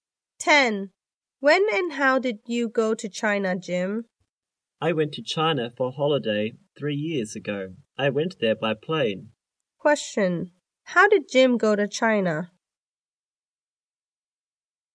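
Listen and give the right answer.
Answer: By plane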